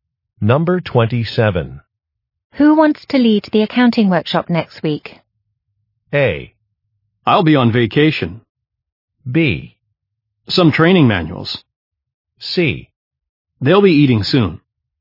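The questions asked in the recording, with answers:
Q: Who wants to lead the accounting workshop next week?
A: A: I'll be on vacation.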